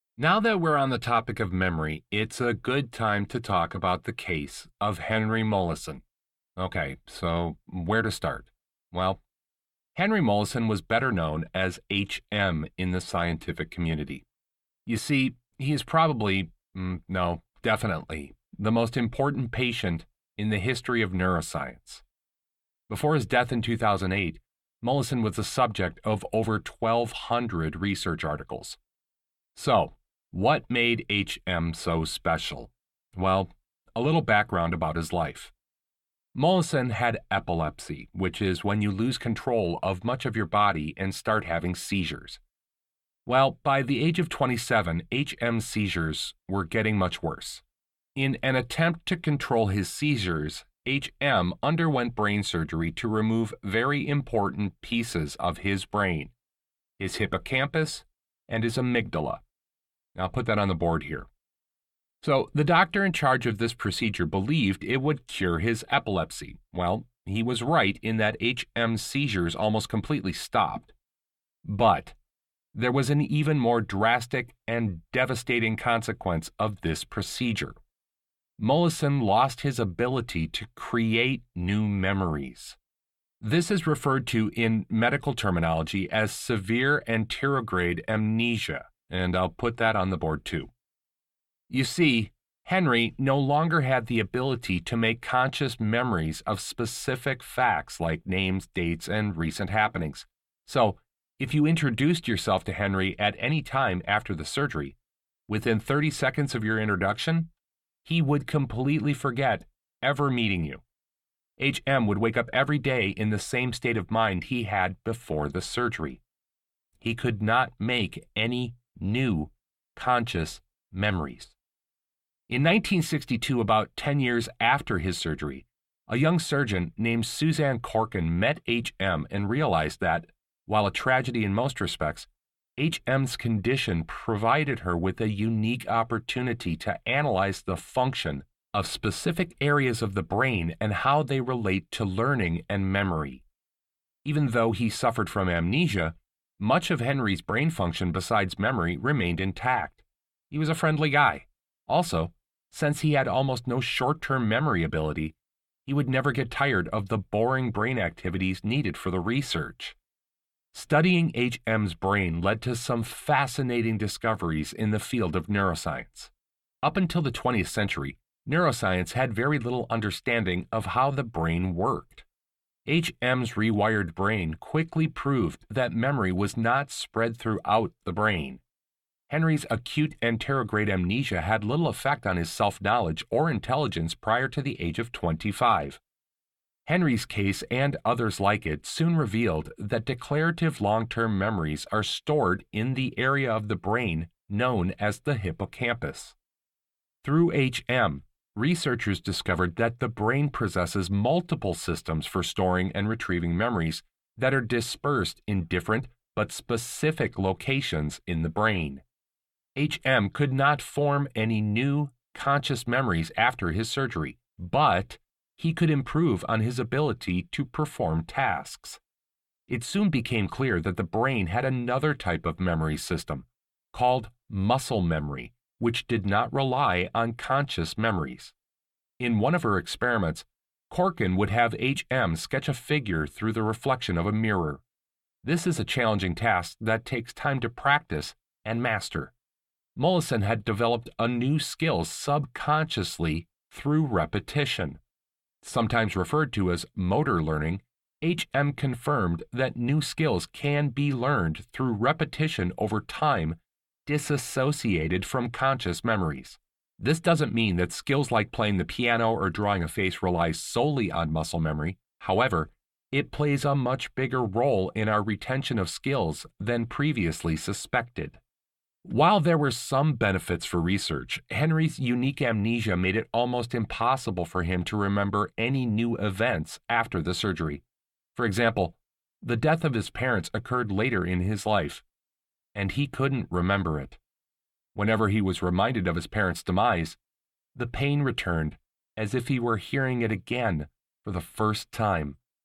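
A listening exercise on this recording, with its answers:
Listen to part of a talk in a psychology class, take some notes on the class before clicking next and going on to answer the questions. LISTEN ONLY ONCE.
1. What is the lecture mainly about?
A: The case of Henry Molaison (H.M.) and what it revealed about memory and the brain

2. How does the professor organize the lecture?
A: By describing one case study: H.M.'s background, his surgery and its effects, then the research findings

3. What does the professor imply about Henry Molaison's situation?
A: It was tragic for him but very valuable for neuroscience research

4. After his surgery, why would Henry Molaison forget about meeting someone 30 seconds later?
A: His hippocampus was removed, so he had severe anterograde amnesia and could not form new conscious memories

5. How was Henry Molaison able to develop new skills?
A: Through repetition, using muscle memory (motor learning)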